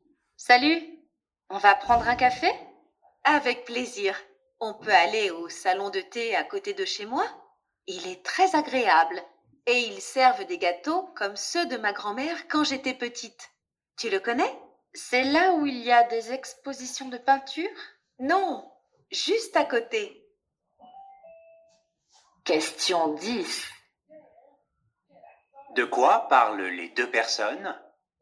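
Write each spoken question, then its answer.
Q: De quoi parlent les deux personnes ?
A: D'aller prendre un café dans un salon de thé près de chez l'une d'elles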